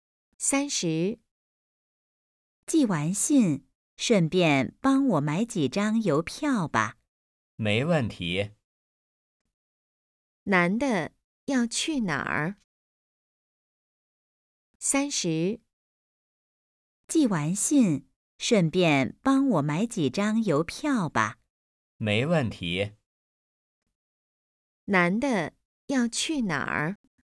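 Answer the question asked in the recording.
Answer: 邮局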